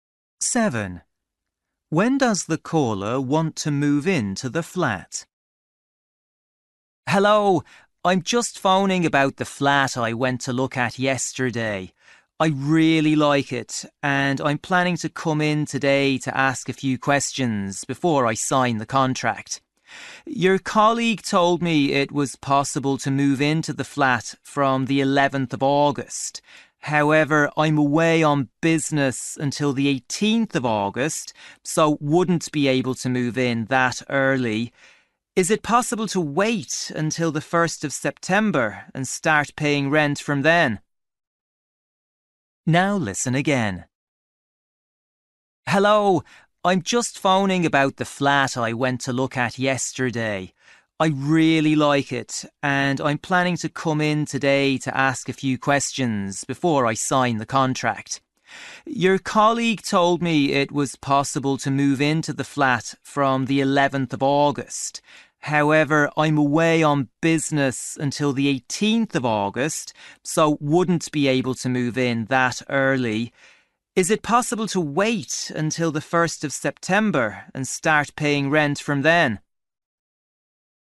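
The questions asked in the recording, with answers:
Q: When does the caller want to move into the flat?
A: On the 1st of September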